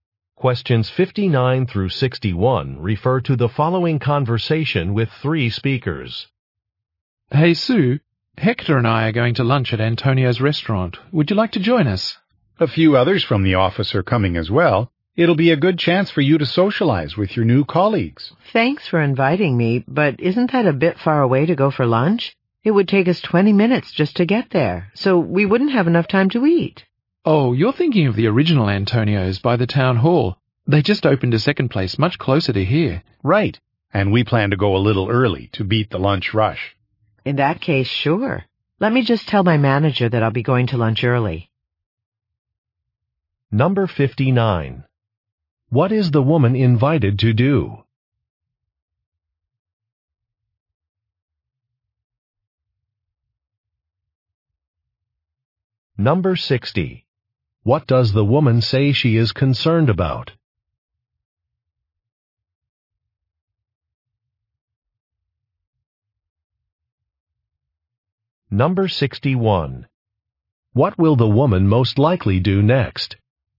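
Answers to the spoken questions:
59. Go to lunch with colleagues
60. The restaurant is too far to have time to eat
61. Tell her manager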